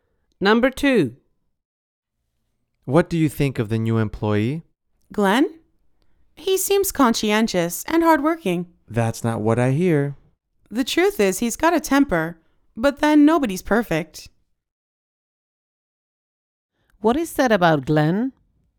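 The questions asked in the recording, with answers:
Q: What is said about Glenn?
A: He has a temper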